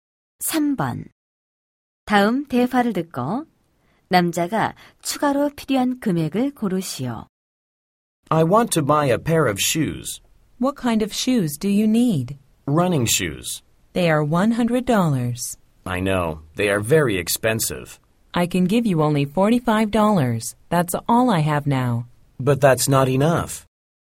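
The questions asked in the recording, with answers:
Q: 다음 대화를 듣고 남자가 추가로 필요한 금액을 고르시오.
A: 55달러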